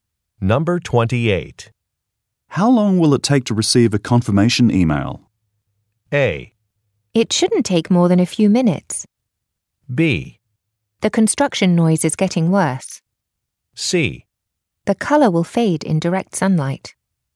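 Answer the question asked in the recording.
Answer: A: It shouldn't take more than a few minutes.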